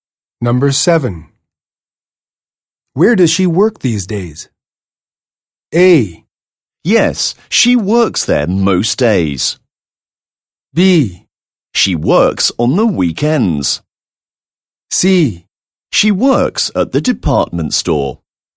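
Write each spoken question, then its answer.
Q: Where does she work these days?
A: C: She works at the department store.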